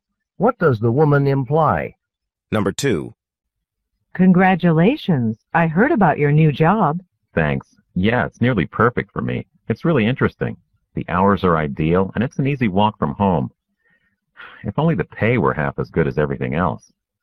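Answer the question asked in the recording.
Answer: He likes the job, but the pay is low.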